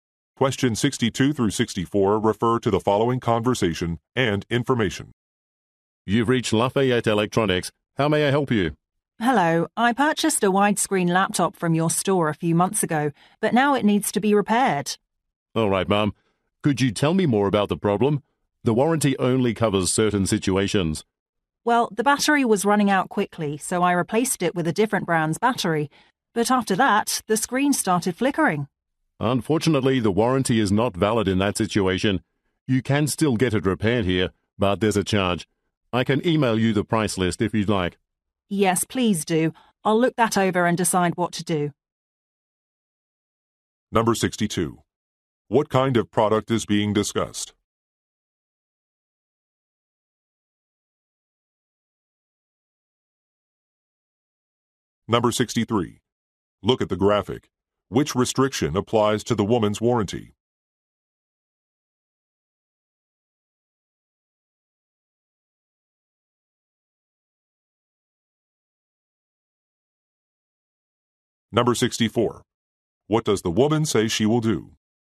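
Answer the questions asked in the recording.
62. A laptop
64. Review the price list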